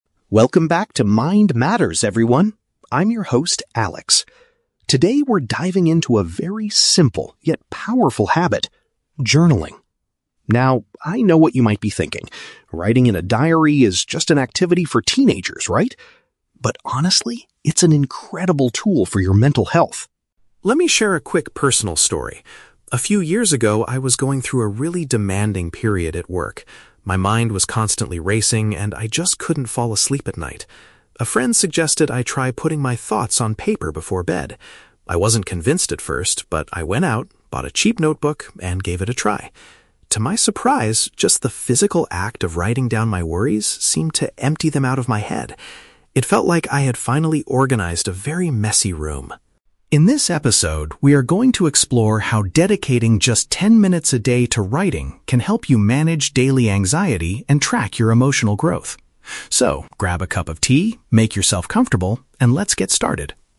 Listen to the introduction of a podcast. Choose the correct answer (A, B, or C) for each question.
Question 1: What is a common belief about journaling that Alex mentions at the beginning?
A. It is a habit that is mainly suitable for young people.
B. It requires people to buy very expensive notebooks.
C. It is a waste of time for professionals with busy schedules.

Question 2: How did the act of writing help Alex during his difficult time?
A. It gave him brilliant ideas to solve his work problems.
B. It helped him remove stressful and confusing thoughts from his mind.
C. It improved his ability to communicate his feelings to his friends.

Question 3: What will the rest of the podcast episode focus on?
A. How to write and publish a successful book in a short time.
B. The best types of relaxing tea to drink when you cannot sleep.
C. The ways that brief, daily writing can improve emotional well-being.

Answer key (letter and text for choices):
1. A. It is a habit that is mainly suitable for young people.
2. B. It helped him remove stressful and confusing thoughts from his mind.
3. C. The ways that brief, daily writing can improve emotional well-being.

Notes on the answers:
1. The Key: Alex says people might think "writing in a diary is just an activity for teenagers". This is paraphrased in option A as "mainly suitable for young people". The Trap (B): Alex mentions that he bought a "cheap notebook", which means it is not expensive. The cost of the notebook is not the common belief he mentions (Mentioned but wrong context). Plausible Trap (C): Believing journaling is a waste of time is a plausible opinion for busy people, but Alex does not state this in the audio.
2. The Key: Alex says that writing his worries down seemed to "empty them out of my head" and it felt like he had "organized a very messy room". This is paraphrased as removing "stressful and confusing thoughts from his mind". The Trap (A): Work is mentioned ("a really demanding period at work"), but writing helped him clear his mind to sleep, not solve his actual office problems (Mentioned but wrong context). Plausible Trap (C): A friend is mentioned as the person who gave the advice, but Alex didn't use journaling to communicate with that friend.
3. The Key: Alex says they will explore "how dedicating just ten minutes a day to writing can help you manage daily anxiety". "Ten minutes a day" is paraphrased as "brief, daily writing", and managing anxiety matches "improve emotional well-being". The Trap (A): The words "writing" and "ten minutes" might make listeners think of writing a book quickly, but the podcast is about mental health, not becoming an author (Plausible but not mentioned). The Trap (B): Alex tells the listeners to "grab a cup of tea" at the very end, but this is just a friendly suggestion to get comfortable, not the main topic of the episode (Mentioned but rejected as the main topic).

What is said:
Alex: Welcome back to Mind Matters, everyone. I'm your host, Alex. Today, we're diving into a very simple, yet powerful habit: journaling. Now, I know what you might be thinking—writing in a diary is just an activity for teenagers, right? But honestly, it's an incredible tool for your mental health.
Let me share a quick personal story. A few years ago, I was going through a really demanding period at work. My mind was constantly racing, and I just couldn't fall asleep at night. A friend suggested I try putting my thoughts on paper before bed. I wasn't convinced at first, but I went out, bought a cheap notebook, and gave it a try. To my surprise, just the physical act of writing down my worries seemed to empty them out of my head. It felt like I had finally organized a very messy room.
In this episode, we are going to explore how dedicating just ten minutes a day to writing can help you manage daily anxiety and track your emotional growth. So, grab a cup of tea, make yourself comfortable, and let's get started.